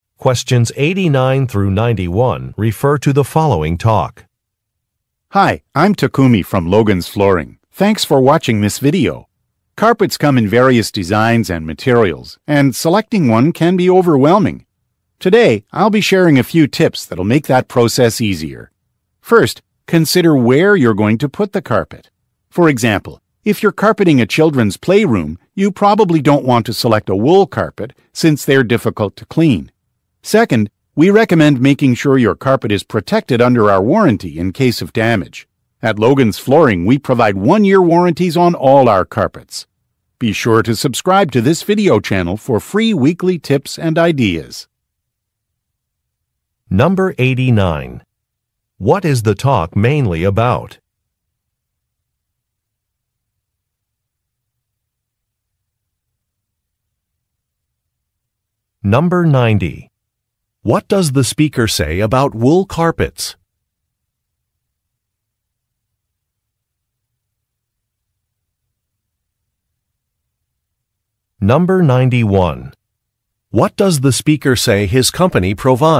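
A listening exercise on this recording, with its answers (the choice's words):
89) What is the talk mainly about?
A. Cleaning a carpet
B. Installing a carpet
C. Designing a carpet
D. Choosing a carpet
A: Choosing a carpet

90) What does the speaker say about wool carpets?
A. They are difficult to find.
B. They are expensive.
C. They are hard to clean.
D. They are durable.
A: They are hard to clean.

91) What does the speaker say his company provides?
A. A free in-store consultation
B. A children's play area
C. Flooring design samples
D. One-year warranties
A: One-year warranties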